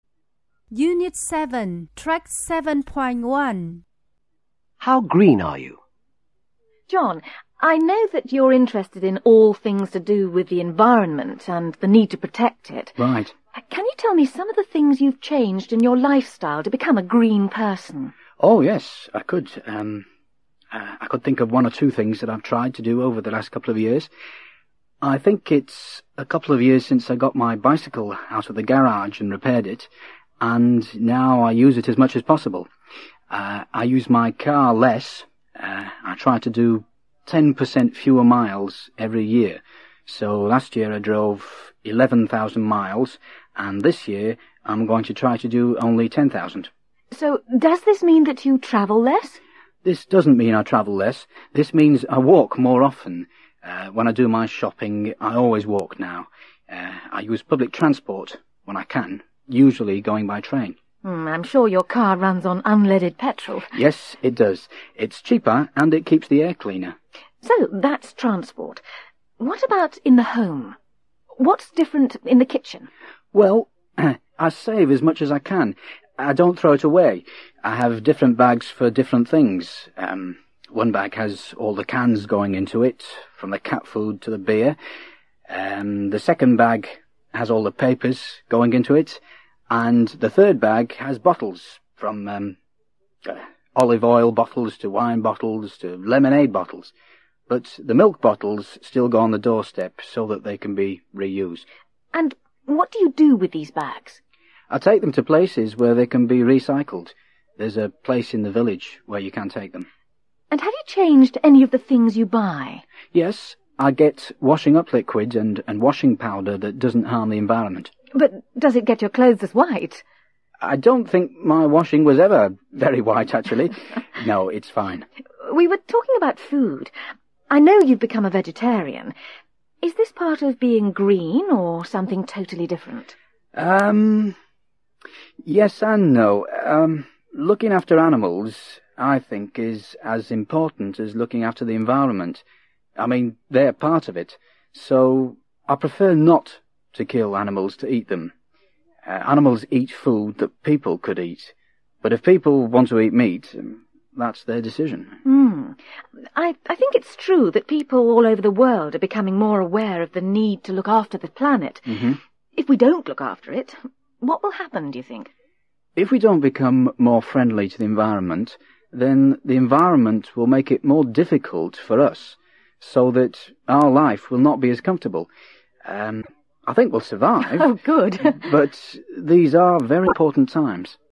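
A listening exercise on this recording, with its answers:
Then listen and write T (true) or F (false).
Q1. John Bains now uses his bicycle a lot.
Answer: T

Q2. John Bains drove ten thousand miles last year.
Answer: F

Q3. He walks less.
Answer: F

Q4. All the papers go into the second bags.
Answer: T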